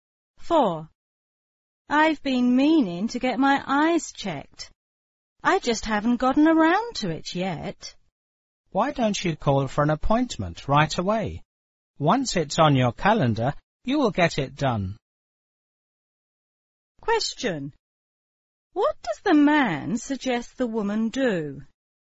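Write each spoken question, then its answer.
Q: What does the man suggest the woman do?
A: Call right away to make an appointment for an eye check.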